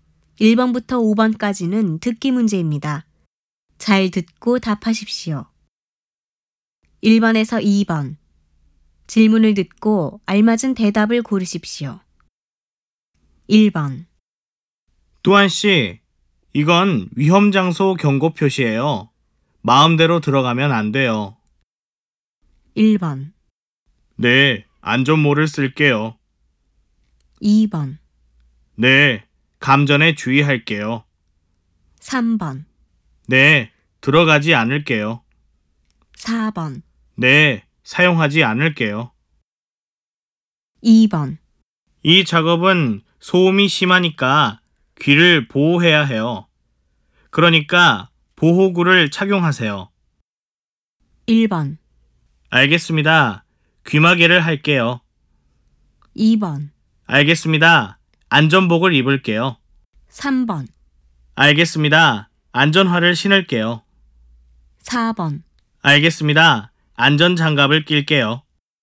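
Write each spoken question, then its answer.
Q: 도안 씨, 이건 위험 장소 경고 표시예요. 마음대로 들어가면 안 돼요.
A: 3: 네, 들어가지 않을게요.

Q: 이 작업은 소음이 심하니까 귀를 보호해야 해요. 그러니까 보호구를 착용하세요.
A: 1: 알겠습니다. 귀마개를 할게요.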